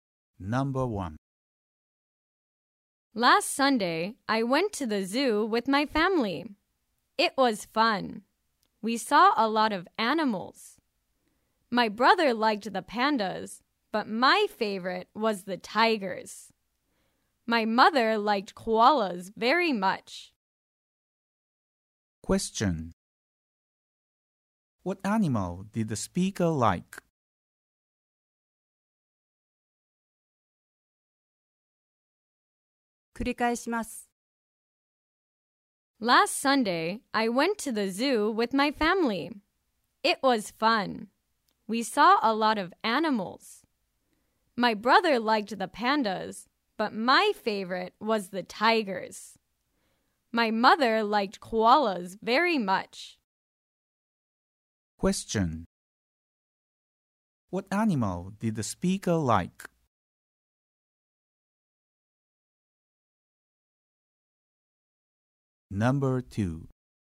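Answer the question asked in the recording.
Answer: Tigers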